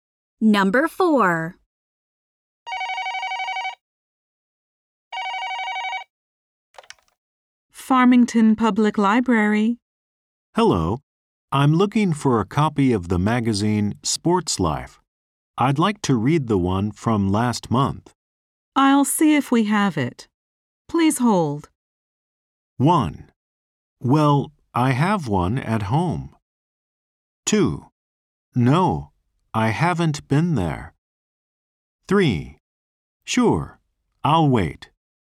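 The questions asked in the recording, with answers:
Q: I'll see if we have it. Please hold.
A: 3: Sure, I'll wait.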